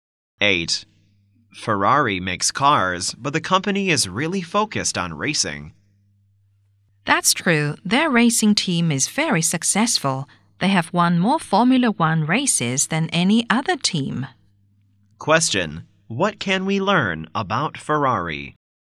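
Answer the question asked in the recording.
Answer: It focuses on racing and has won more Formula One races than any other team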